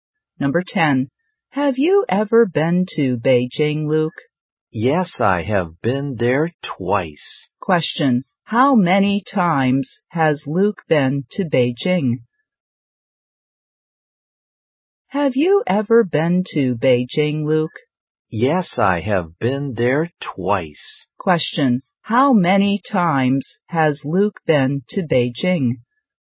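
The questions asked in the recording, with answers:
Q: How many times has Luke been to Beijing?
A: Twice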